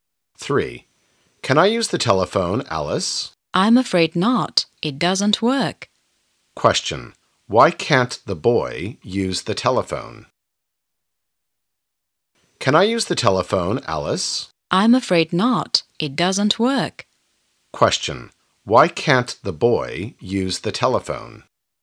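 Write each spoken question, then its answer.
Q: Why can't the boy use the telephone?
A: Because it doesn't work.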